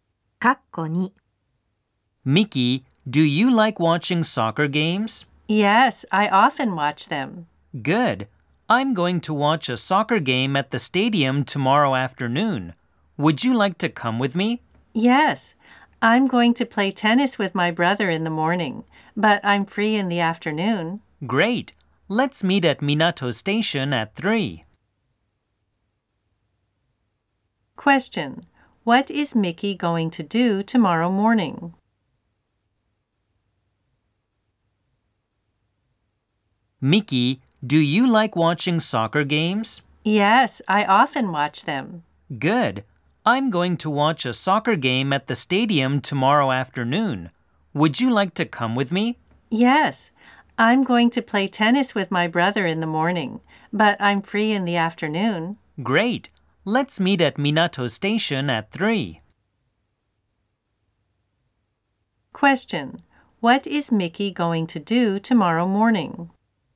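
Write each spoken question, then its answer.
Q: Question.What is Miki going to do tomorrow morning?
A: Play tennis with her brother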